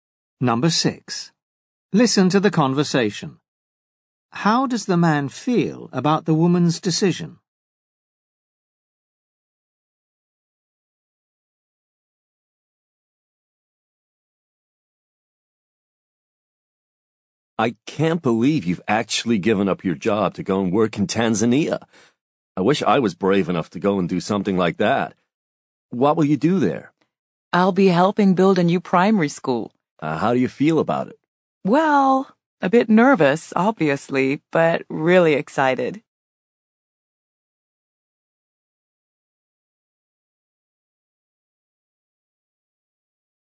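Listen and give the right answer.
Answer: He admires her for being brave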